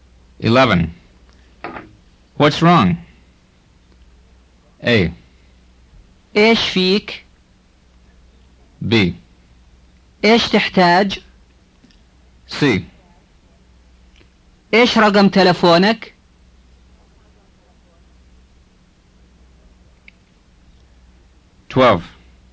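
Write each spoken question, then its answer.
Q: What's wrong?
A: A: إيش فيك؟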